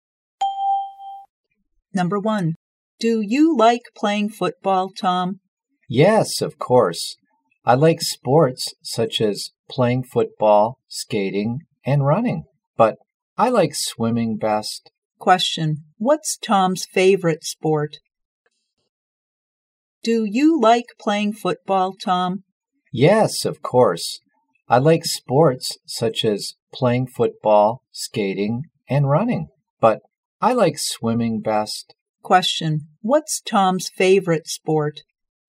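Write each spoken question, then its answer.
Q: What's Tom's favorite sport?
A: Swimming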